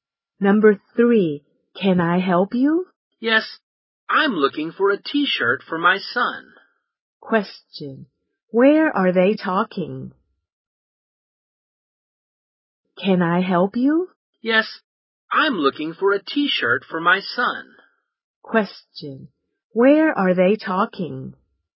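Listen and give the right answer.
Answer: In a clothes shop.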